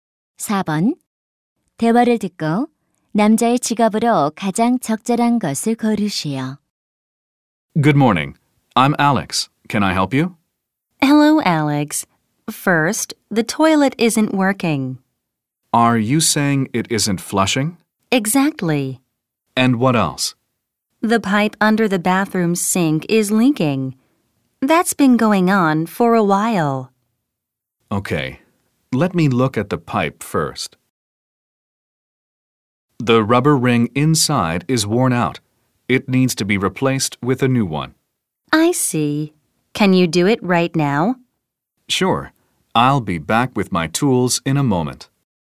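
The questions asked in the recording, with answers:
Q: 대화를 듣고 남자의 직업으로 가장 적절한 것을 고르시오.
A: 배관공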